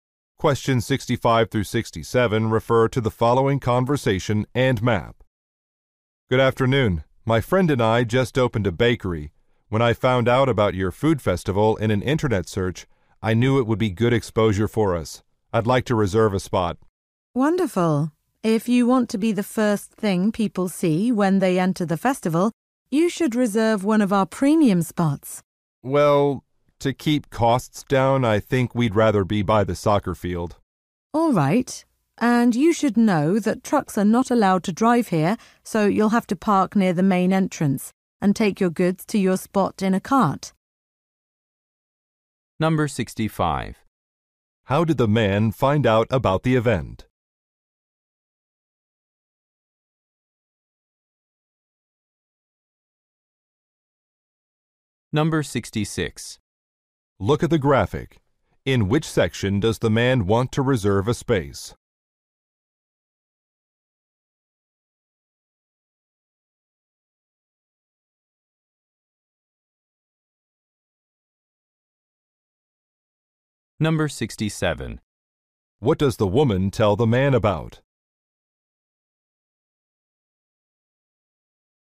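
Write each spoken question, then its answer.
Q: How did the man find out about the event?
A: Through an internet search

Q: What does the woman tell the man about?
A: Trucks are not allowed; park near the main entrance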